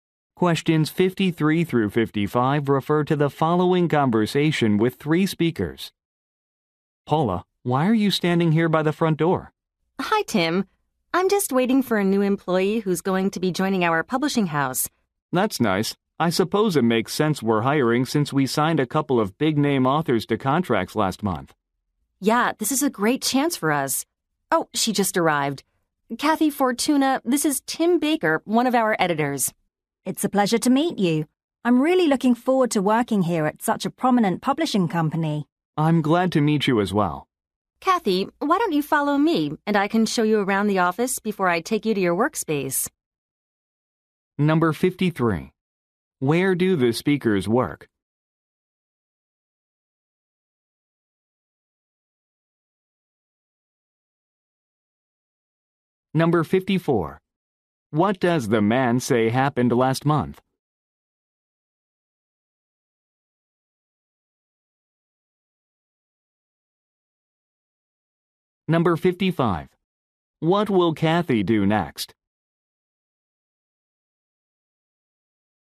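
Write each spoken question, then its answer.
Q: Where do the speakers work?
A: At a publishing house.

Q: What does the man say happened last month?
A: They signed contracts with big-name authors.

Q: What will Kathy do next?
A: Take a tour of the office.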